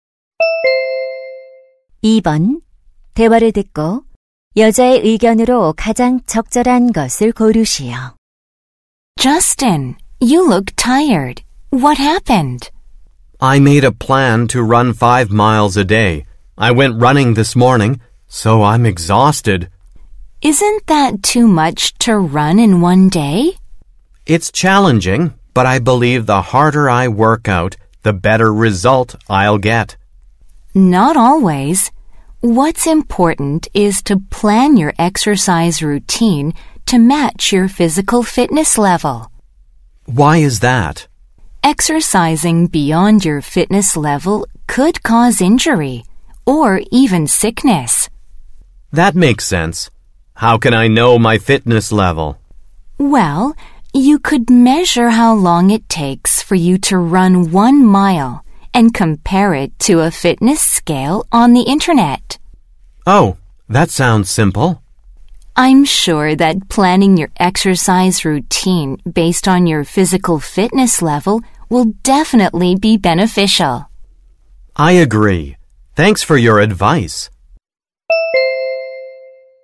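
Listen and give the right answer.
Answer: 체력 수준에 맞게 운동 계획을 세워야 한다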